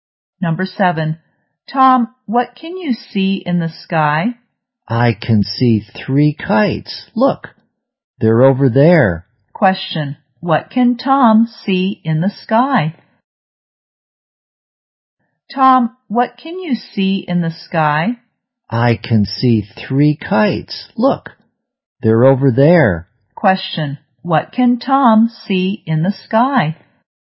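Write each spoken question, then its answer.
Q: what can Tom see in the sky?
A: Three kites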